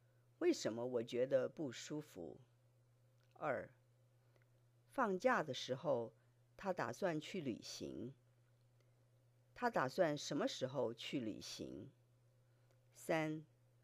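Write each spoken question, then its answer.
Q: 他打算什么时候去旅行?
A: 放假的时候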